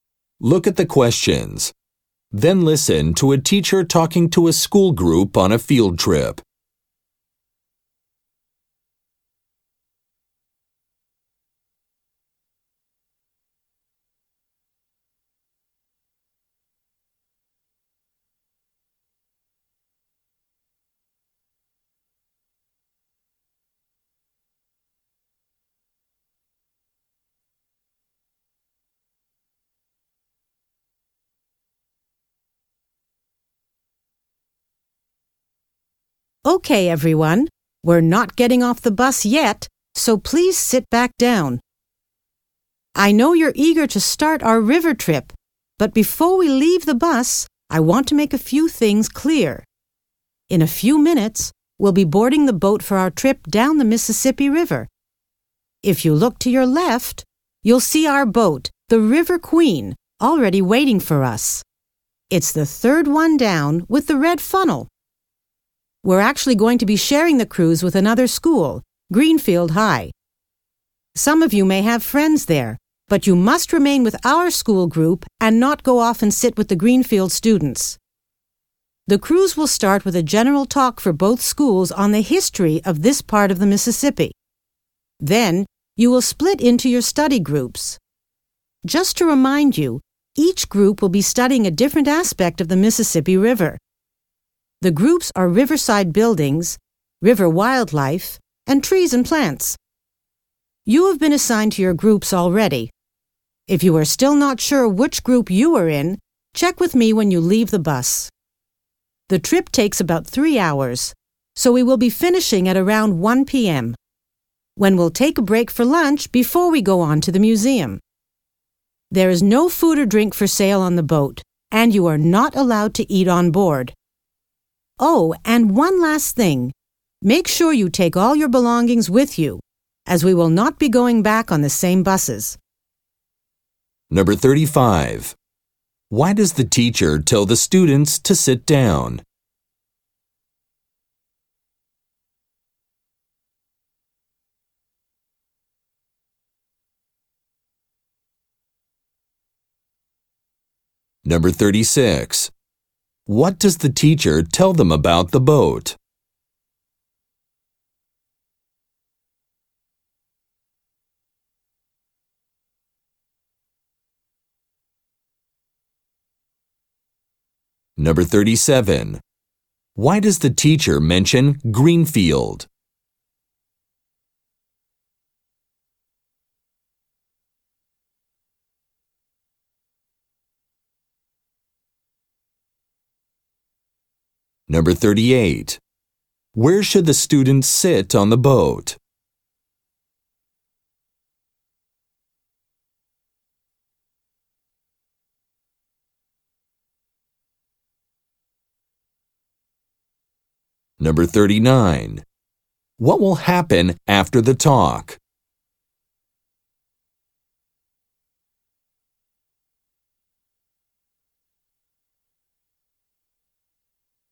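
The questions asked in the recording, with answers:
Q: Why does the teacher tell the students to sit down?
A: He wants to explain some things before they leave the bus

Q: What does the teacher tell them about the boat?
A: It is the third one down with the red funnel, the River Queen

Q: Why does the teacher mention Greenfield?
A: Greenfield High students will share the cruise

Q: Where should the students sit on the boat?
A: With their own school group

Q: What will happen after the talk?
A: The students will split into their study groups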